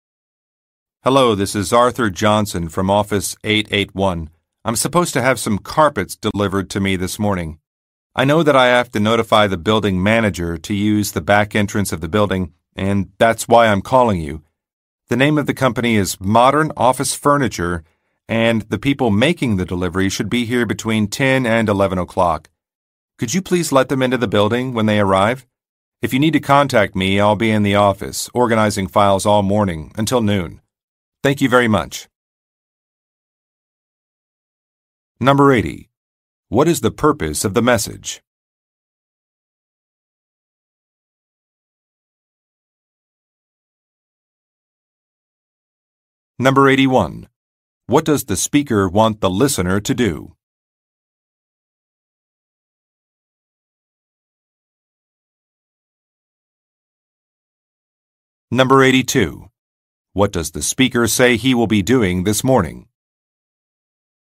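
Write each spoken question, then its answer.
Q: What is the purpose of the message?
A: To arrange for a carpet delivery to come in through the back entrance

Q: What does the speaker want the listener to do?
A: Let the delivery people into the building

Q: What does the speaker say he will be doing this morning?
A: Organizing files in his office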